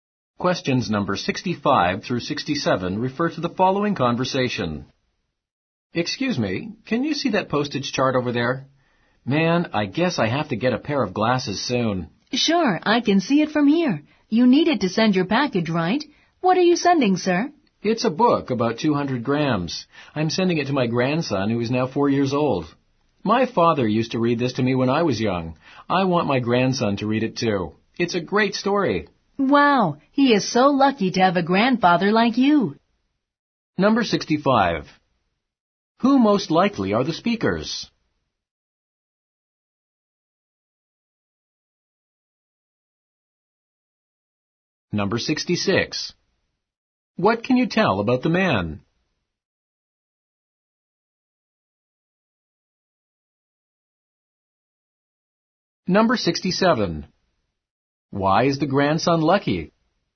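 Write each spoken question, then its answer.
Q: Who most likely are the speakers?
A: A post office clerk and a customer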